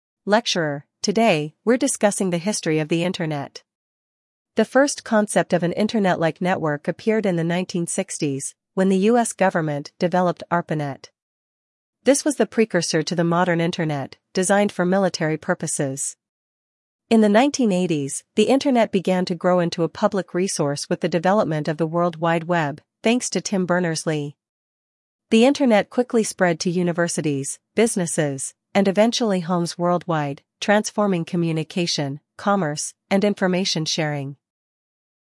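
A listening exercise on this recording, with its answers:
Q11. When did the first internet-like network appear?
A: In the 1960s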